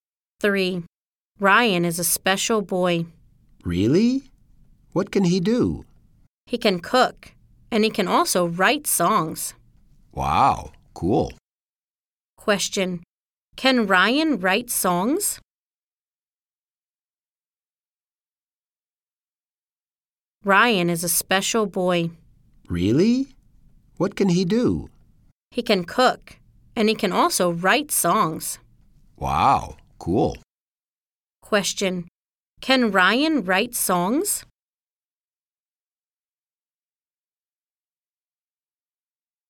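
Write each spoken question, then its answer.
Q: Can Ryan write songs?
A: Yes, he can.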